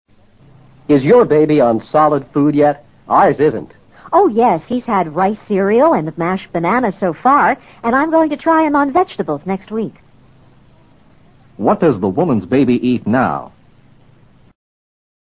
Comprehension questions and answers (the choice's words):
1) What does the woman' s baby eat now?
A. Vegetables.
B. Cereal and vegetables.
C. Cereal and banana.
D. Rice and mashed fruit.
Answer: Cereal and banana.

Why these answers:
答案与她说的话"He's had rice cereal and mashed banana"基本相同。A,B,D则完全不同,或只有部分相同,rice 与rice cereal 是截然不同的两种食品。rice指大米或大米饭。rice cereal则指经过加工的食品,如米花等膨化食品。banana与mashed banana(捣烂的香蕉)则没有本质的区别。solid food: 固体食品,指与牛乳等相对的非液体的食品。

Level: 世博高级听说